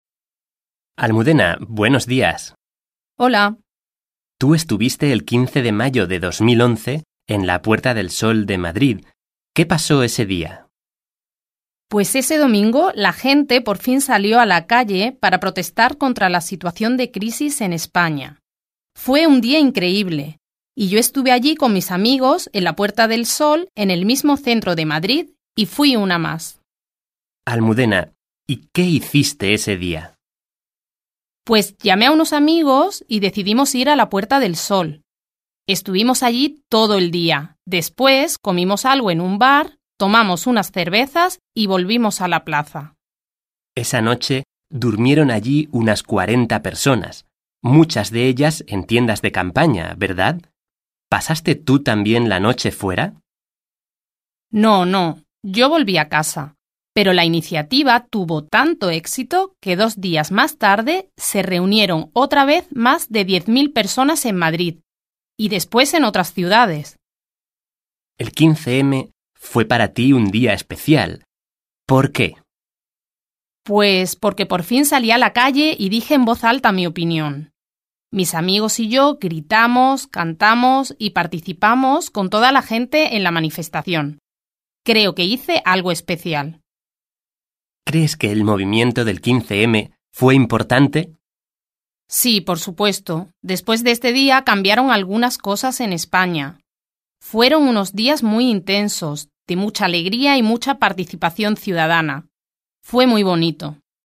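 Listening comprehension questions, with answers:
Hören Sie den Dialog und wählen Sie die beiden richtigen Aussagen aus.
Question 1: Almudena fue sola a la Puerta del Sol el 15 de mayo de 2011.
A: falso

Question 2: Ella durmió en la plaza en una tienda de campaña.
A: falso

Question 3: Almudena dice que hubo cambios en España después de ese día.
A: verdadero

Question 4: Almudena tiene un recuerdo positivo del 15-M.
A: verdadero

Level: B1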